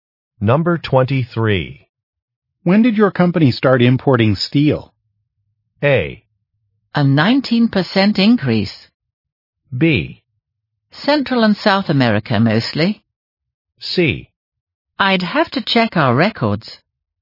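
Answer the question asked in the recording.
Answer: C: I'd have to check our records.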